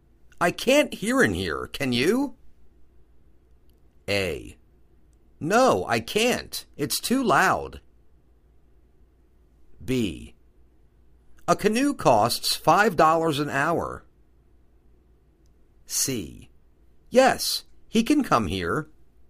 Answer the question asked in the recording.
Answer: No, I can't. It's too loud.